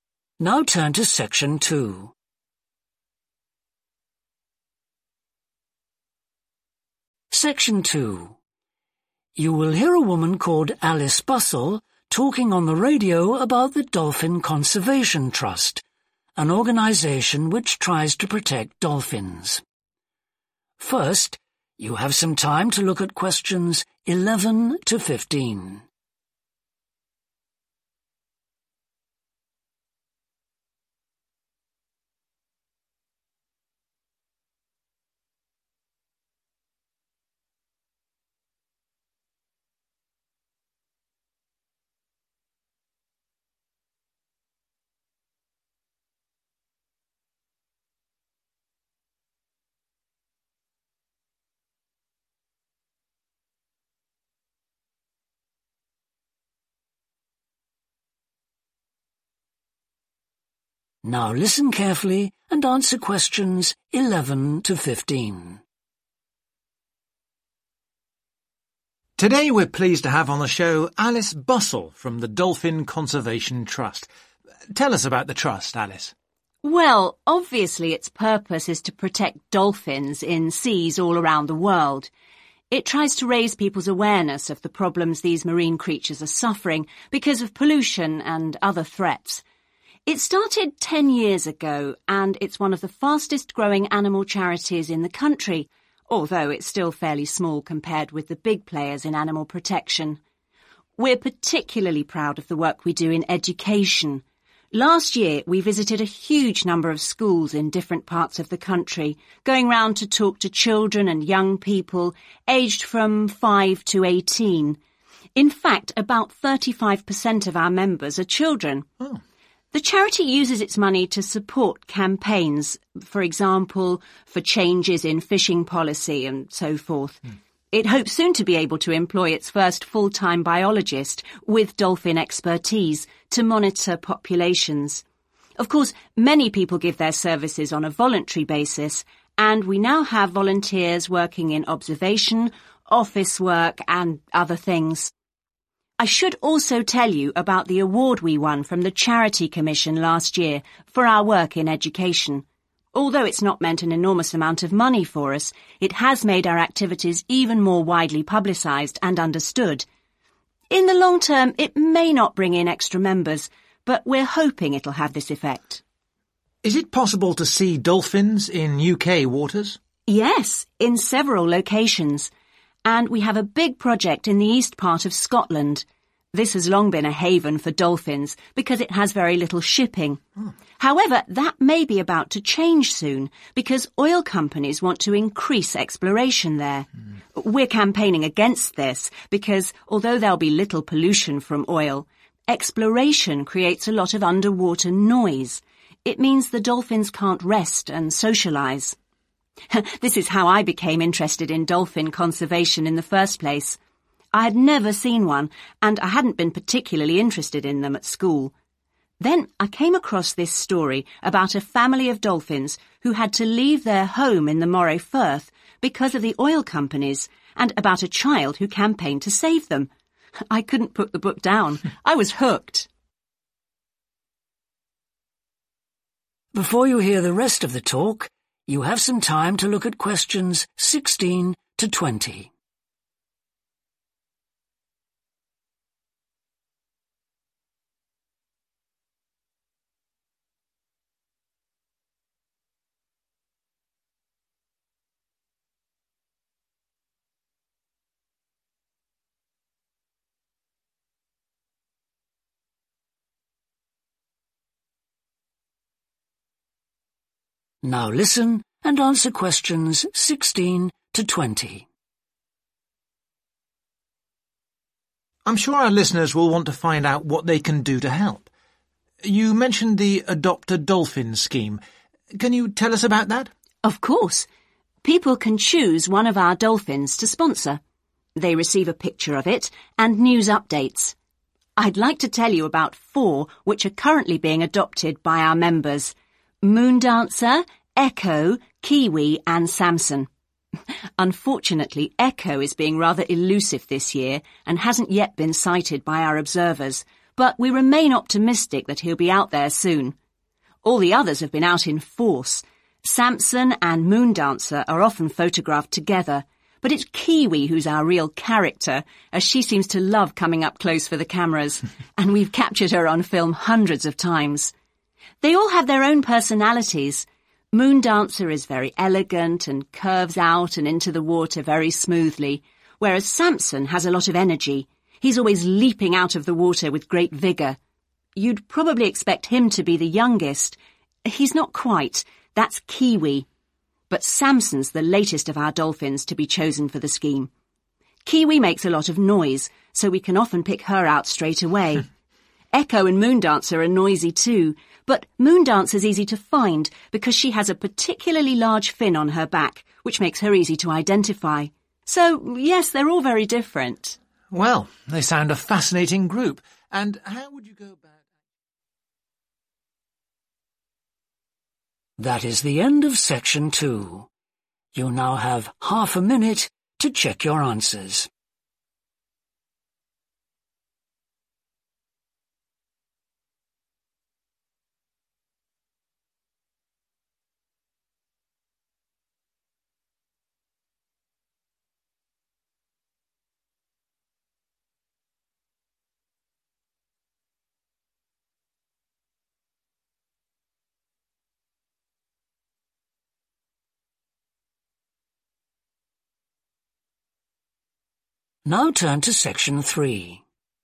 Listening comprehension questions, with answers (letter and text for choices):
Choose TWO letters, A-E.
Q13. Why is Alice so pleased the Trust has won the Charity Commission award?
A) It has brought in extra money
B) It made the work of the trust better known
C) It has attracted more members.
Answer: B) It made the work of the trust better known

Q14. Alice says oil exploration causes problems to dolphins because of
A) noise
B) oil leaks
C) movement of ships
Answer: A) noise

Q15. Alice became interested in dolphins when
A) she saw one swimming near her home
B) she heard a speaker at her school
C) she read a book about them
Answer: C) she read a book about them

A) Moondancer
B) Echo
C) Kiwi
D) Samson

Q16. It has not been seen this year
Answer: B) Echo

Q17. It is photographed more than the others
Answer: C) Kiwi

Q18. It is always very energetic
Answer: D) Samson

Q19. It is the newest one in the scheme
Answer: D) Samson

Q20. It has an unusual shape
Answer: A) Moondancer